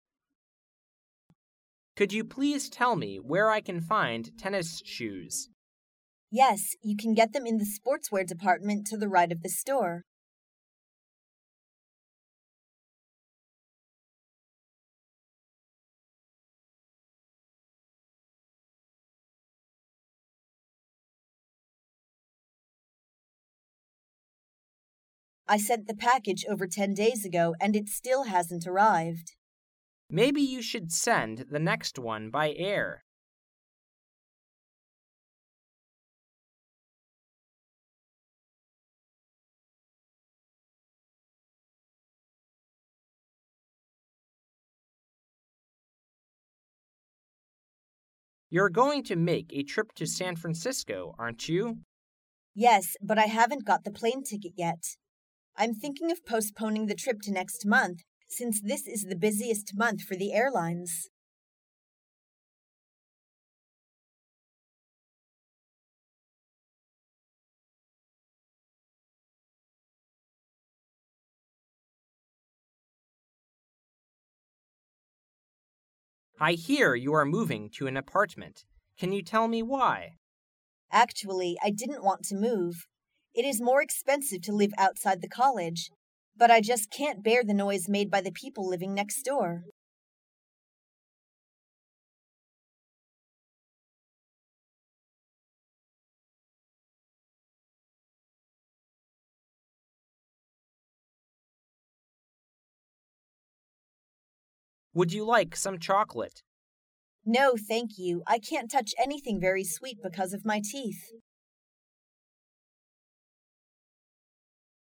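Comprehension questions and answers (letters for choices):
You will hear 10 short dialogues. For each dialogue, there is one question and four possible answers. Choose the correct answer--A, B, C or D, and mark it in your test booklet. You will have 15 seconds to answer the question and you will hear each dialogue ONLY ONCE.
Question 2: What does the man suggest?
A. Arrive early.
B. Take a ship.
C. Look for the package.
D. Use airmail.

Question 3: What do we know about the woman from this conversation?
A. She has to change the time for the trip.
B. She hasn't decided where to go next month.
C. She can't afford the time for the trip.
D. She will manage to leave this month.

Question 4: Why does the woman want to move?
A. The apartment is better furnished.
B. She prefers to live in a quiet place.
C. It's less expensive to live in an apartment.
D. She finds her roommates difficult to get along with.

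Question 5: Why doesn't the woman accept the chocolate?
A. Because of her stomachache.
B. Because she doesn't like it.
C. Because of her teeth problem.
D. Because she never eats chocolate before.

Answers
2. D
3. A
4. B
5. C

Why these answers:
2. W: I sent the package over ten days ago and it still hasn't arrived. M: Maybe you should send the next one by air.
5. M: Would you like some chocolate? W: No, thank you. I can't touch anything very sweet because of my teeth.

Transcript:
[听力原文] M: You're going to make a trip to San Francisco, aren't you? W: Yes. But I haven't got the plane ticket yet. I'm thinking of postponing the trip to next month since this is the busiest month for the airlines.
[听力原文] M: I hear you are moving to an apartment. Can you tell me why? W: Actually, I didn't want to move. It is more expensive to live outside the college. But I just can't bear the noise made by the people living next door.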